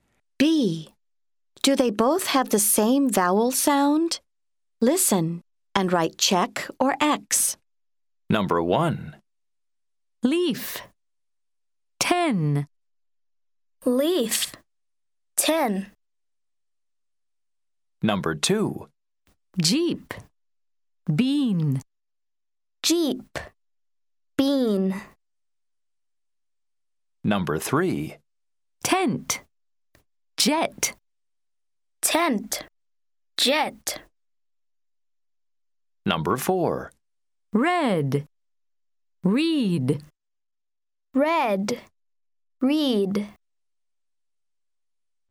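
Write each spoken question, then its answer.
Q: Do they both have the same vowel sound?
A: No (leaf / ten)

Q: Do they both have the same vowel sound?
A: Yes (jeep / bean)

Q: Do they both have the same vowel sound?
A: Yes (tent / jet)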